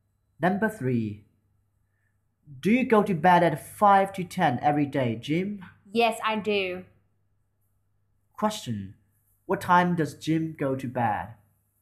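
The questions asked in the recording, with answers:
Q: What time does Jim go to bed?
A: At 9:55 (five to ten)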